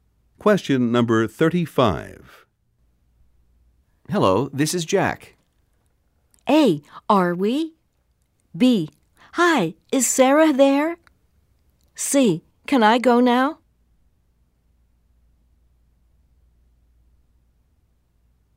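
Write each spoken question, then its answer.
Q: Hello, this is Jack.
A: B: Hi, is Sarah there?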